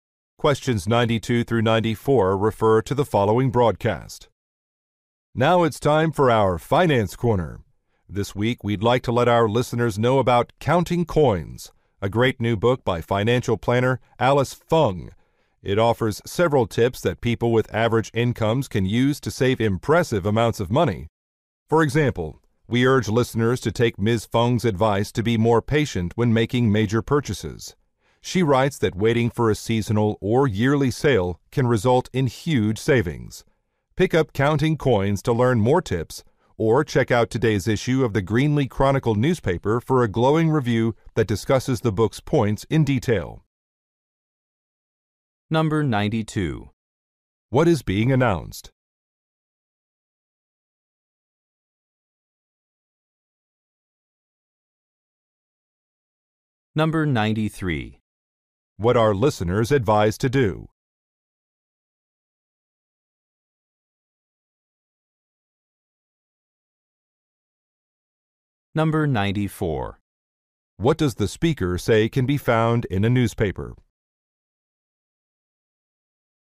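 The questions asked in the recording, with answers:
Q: What is being announced?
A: A new book about saving money

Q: What are listeners advised to do?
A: Wait for sales before major purchases

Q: What does the speaker say can be found in a newspaper?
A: A review of the book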